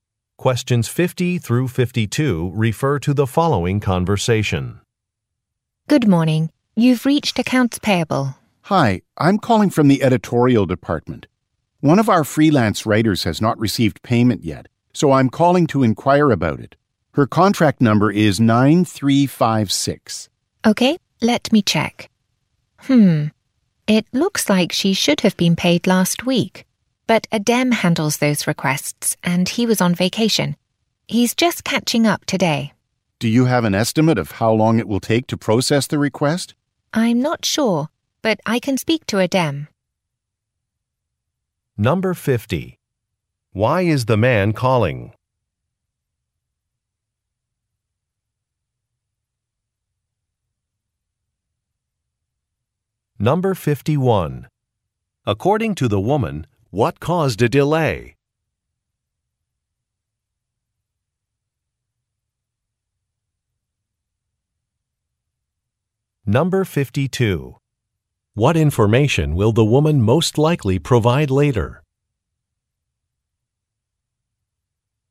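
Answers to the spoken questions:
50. A freelance writer hasn't been paid
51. Adem was on vacation
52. An estimate of the processing time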